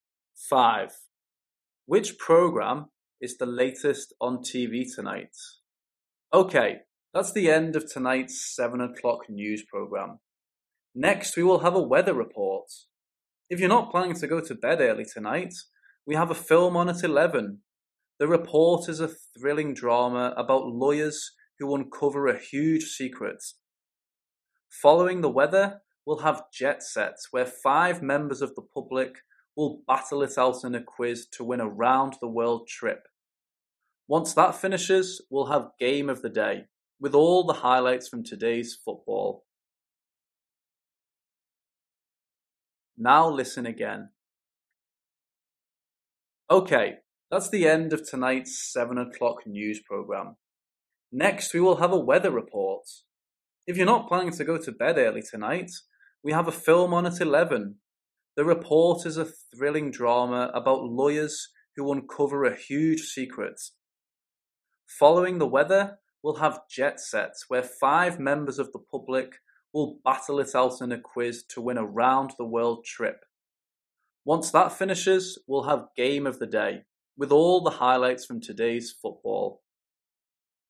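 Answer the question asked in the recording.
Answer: The film (The Report) at 11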